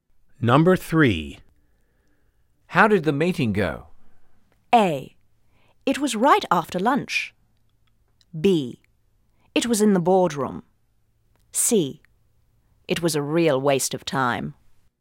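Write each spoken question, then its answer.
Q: How did the meeting go?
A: C: It was a real waste of time.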